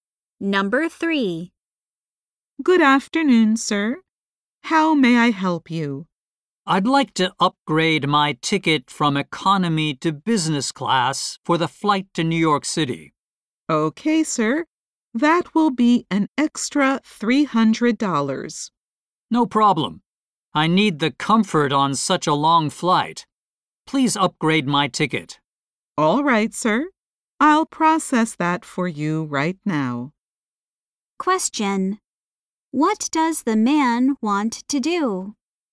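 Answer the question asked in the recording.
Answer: Upgrade his ticket to business class.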